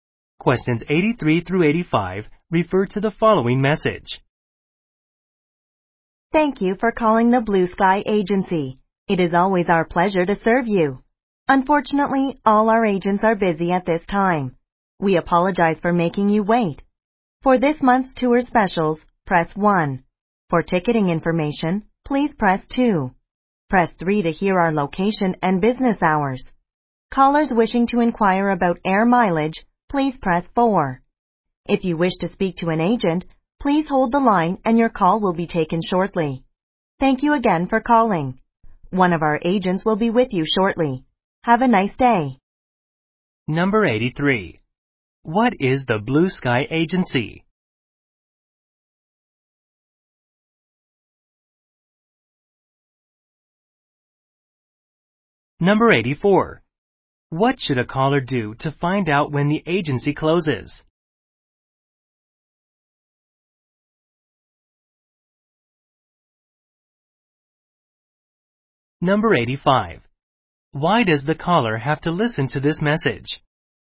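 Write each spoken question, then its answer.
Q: What is the Blue Sky Agency?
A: A travel agency

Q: What should a caller do to find out when the agency closes?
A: Press 3

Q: Why does the caller have to listen to this message?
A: All the agents are busy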